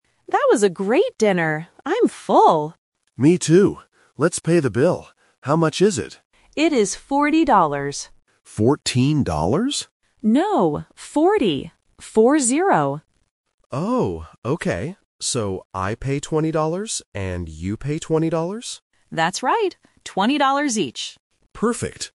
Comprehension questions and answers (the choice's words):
Listen to the conversation between two friends and choose the correct answer (A, B, or C).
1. How much is the total bill?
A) $14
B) $40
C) $20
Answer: $40

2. How much does each person pay?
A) $40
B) $10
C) $20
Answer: $20

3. What are they doing?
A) Ordering food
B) Paying for their meal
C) Cooking dinner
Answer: Paying for their meal

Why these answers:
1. Amy says the bill is "40 dollars" and clarifies it by saying "Four-zero" when Ben asks again. Why the trap is wrong: Option A ($14) is a phonetic trap. Ben mishears "forty" as "fourteen", but Amy corrects him immediately.
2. Ben calculates the split: "I pay 20 dollars and you pay 20 dollars," and Amy agrees. Why the trap is wrong: Option A ($40) is the total amount, not the amount per person. Option B ($10) is not mentioned.
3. Ben says, "Let's pay the bill," which indicates they have finished eating and are now paying. Why the trap is wrong: Option A is wrong because they already ate ("That was a great dinner"). Option C is not mentioned.

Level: A1